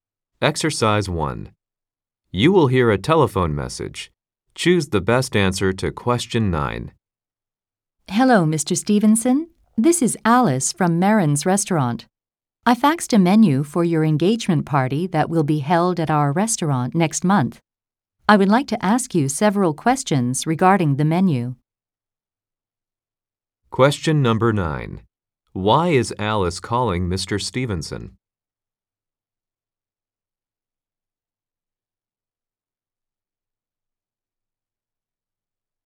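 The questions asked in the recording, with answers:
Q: Why is Alice calling Mr. Stevenson?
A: To ask him several questions about the menu for his engagement party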